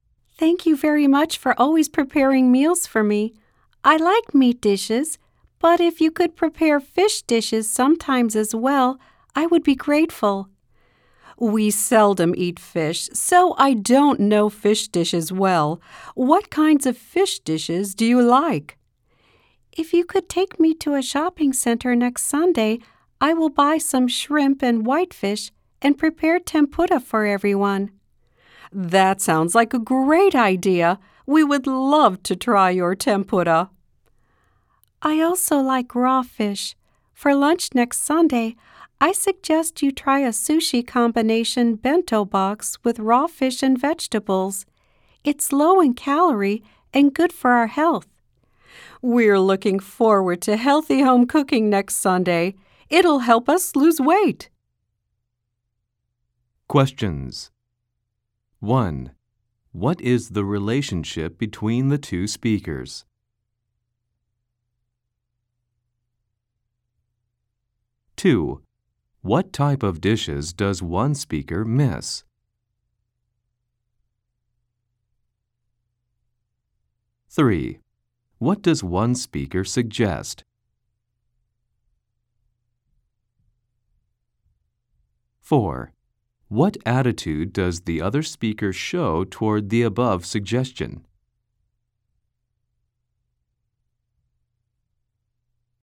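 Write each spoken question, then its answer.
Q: What type of dishes does one speaker miss?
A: Fish dishes

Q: What attitude does the other speaker show toward the above suggestion?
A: Positive and enthusiastic; they look forward to it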